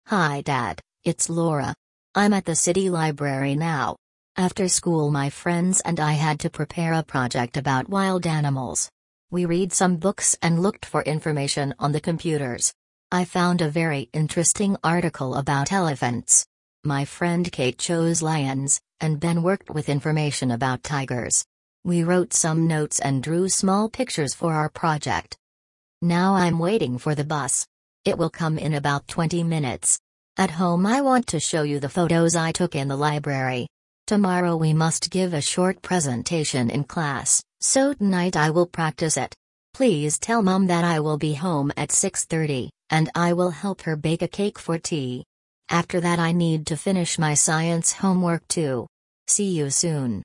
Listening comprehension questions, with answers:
Прослушайте текст и определите, какие из приведённых утверждений A–E соответствуют содержанию текста (1 – True), какие не соответствуют (2 – False).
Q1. Laura is in the city library now.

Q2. She worked only with Kate on the project.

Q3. Laura found information about elephants.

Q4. Tomorrow the class will watch a film about animals.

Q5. Laura will help her mum bake a cake in the evening.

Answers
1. True
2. False
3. True
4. False
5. True

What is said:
Hi Dad, it's Laura. I'm at the city library now. After school my friends and I had to prepare a project about wild animals. We read some books and looked for information on the computers. I found a very interesting article about elephants. My friend Kate chose lions, and Ben worked with information about tigers. We wrote some notes and drew small pictures for our project.
Now I'm waiting for the bus. It will come in about twenty minutes. At home I want to show you the photos I took in the library. Tomorrow we must give a short presentation in class, so tonight I will practise it. Please tell Mum that I will be home at 6:30, and I will help her bake a cake for tea. After that I need to finish my Science homework too. See you soon!

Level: 5 класс